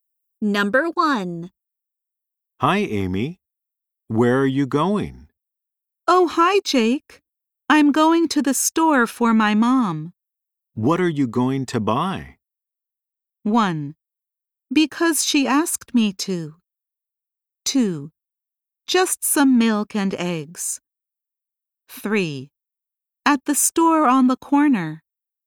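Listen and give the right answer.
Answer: 2: Just some milk and eggs.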